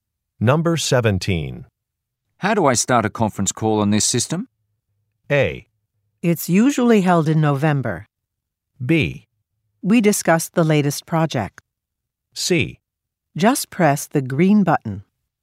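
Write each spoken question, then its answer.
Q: How do I start a conference call on this system?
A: C: Just press the green button.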